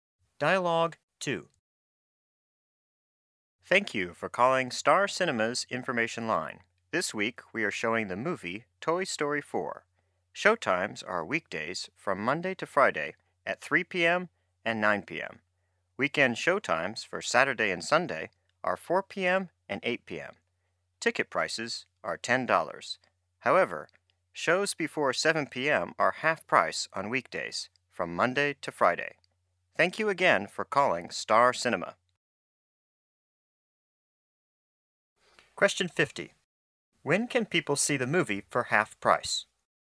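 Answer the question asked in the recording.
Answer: At the 3 p.m. shows on weekdays (Monday to Friday)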